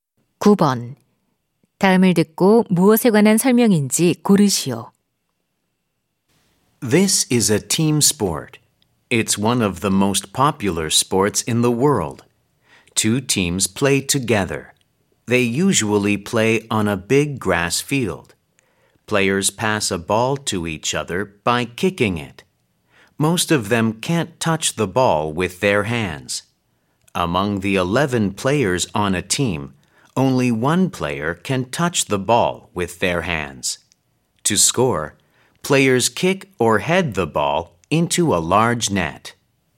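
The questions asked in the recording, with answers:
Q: 다음을 듣고 무엇에 관한 설명인지 고르시오.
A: 축구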